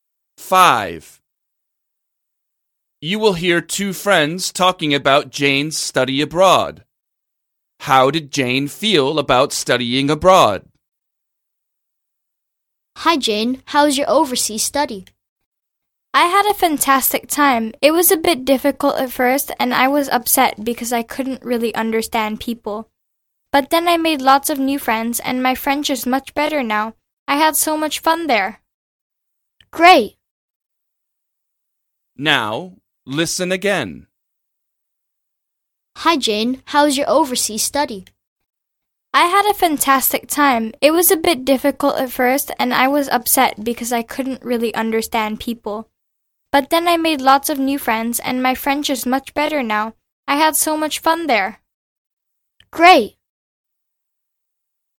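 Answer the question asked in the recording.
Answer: She enjoyed it / had a fantastic time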